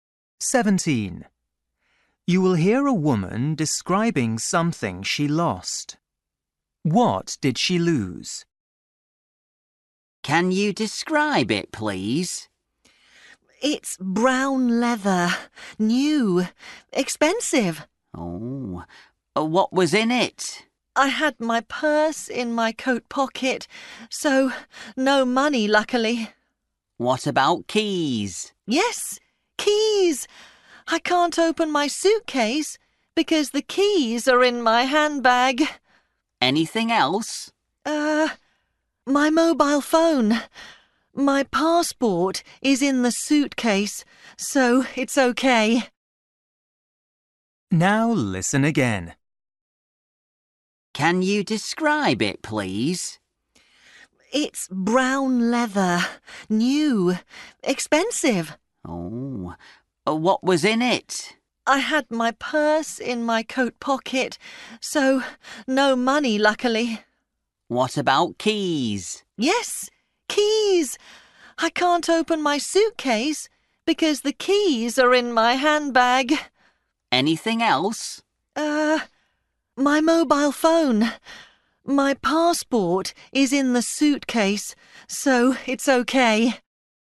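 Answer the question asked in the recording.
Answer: her handbag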